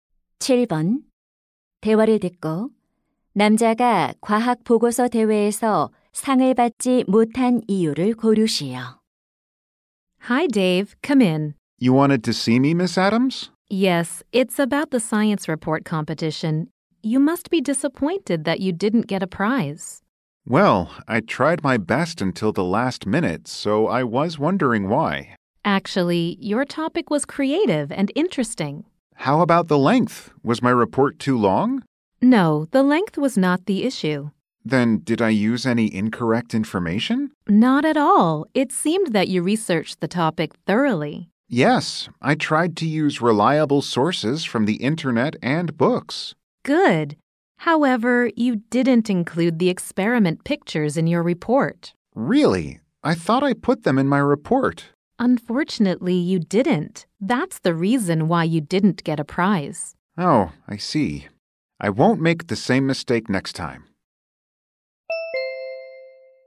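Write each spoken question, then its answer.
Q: 대화를 듣고 남자가 과학 보고서 대회에서 상을 받지 못한 이유를 고르시오.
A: 보고서에 실험 사진을 넣지 않아서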